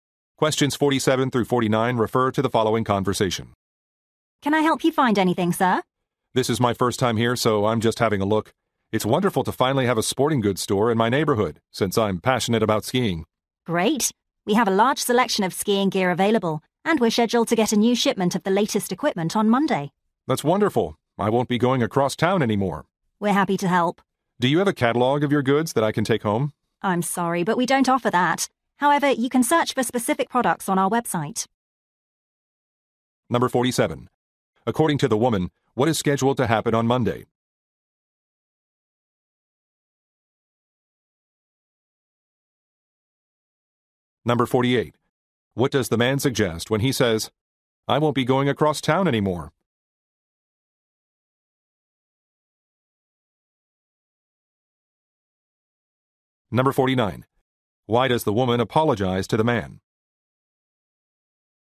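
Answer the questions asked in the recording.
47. A new shipment of the latest ski equipment will arrive
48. He will shop at this store because it is close to his home
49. The store doesn't offer a catalog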